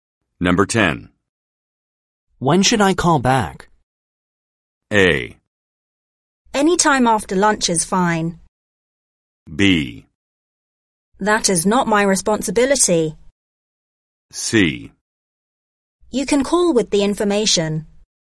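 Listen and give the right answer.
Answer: A: Anytime after lunch is fine.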